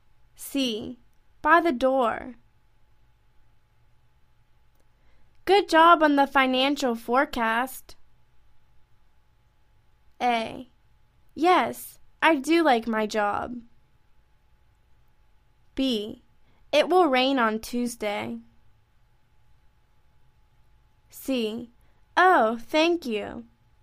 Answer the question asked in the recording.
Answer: Oh, thank you.